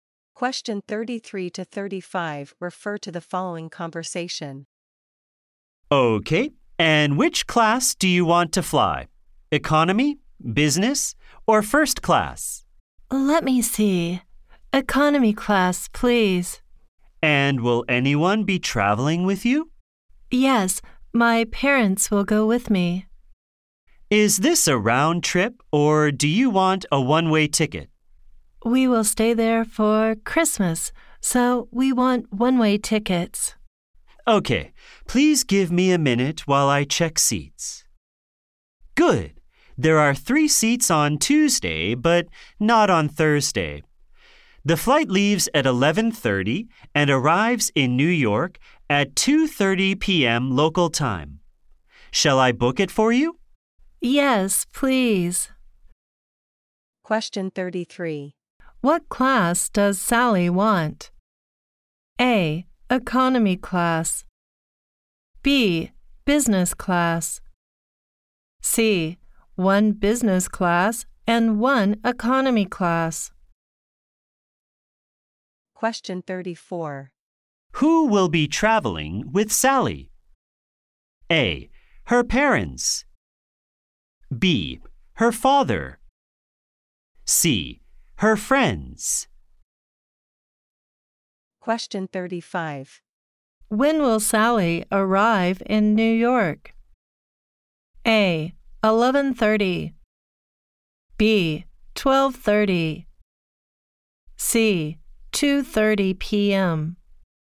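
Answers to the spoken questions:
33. A: Economy class.
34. A: Her parents.
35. C: 2:30 p.m.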